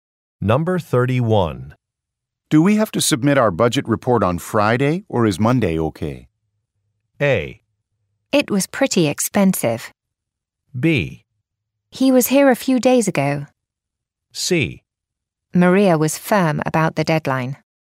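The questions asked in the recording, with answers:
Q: Do we have to submit our budget report on Friday, or is Monday okay?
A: C: Maria was firm about the deadline.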